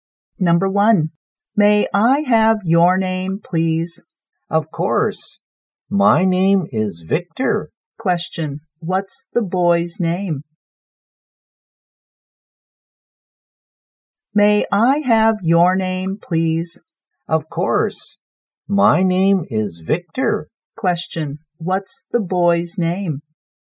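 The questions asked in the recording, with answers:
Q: what's the boy's name?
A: Victor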